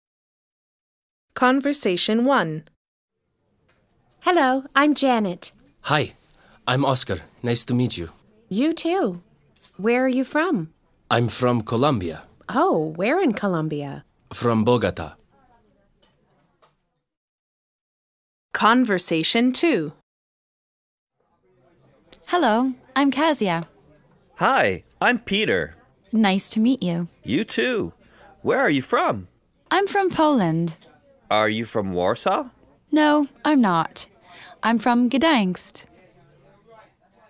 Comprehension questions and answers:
A. Listen and complete the conversations.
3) A: You too. Where 3______ you from?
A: are

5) A: Hello, I 5______ Kasia.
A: 'm

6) B: Hi, I 6______ Peter.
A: 'm

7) B: You too. Where 7______ you from?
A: are

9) B: 9______ you from Warsaw?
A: Are